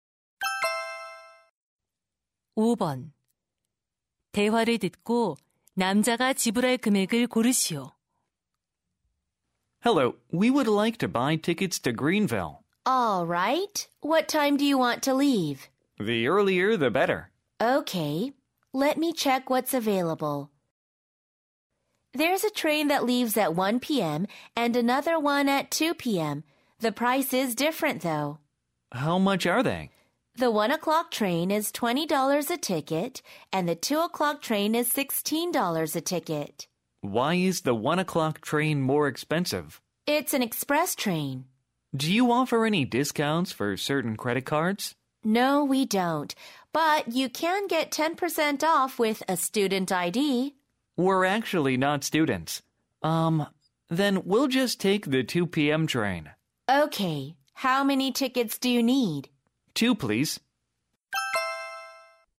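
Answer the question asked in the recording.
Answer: $32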